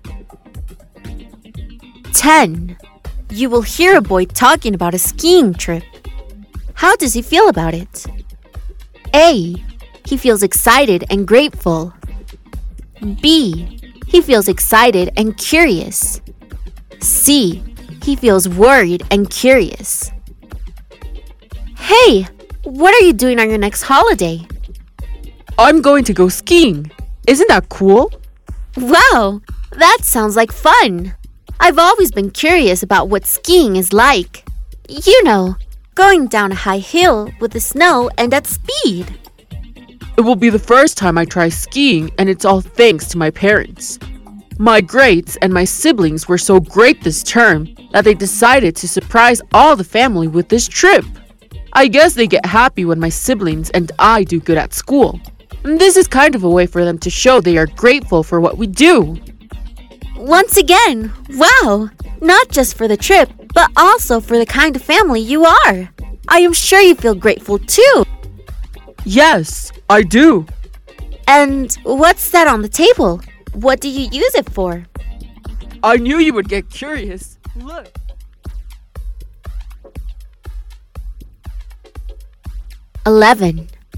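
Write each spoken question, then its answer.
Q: How does he feel about it?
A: A: He feels excited and grateful.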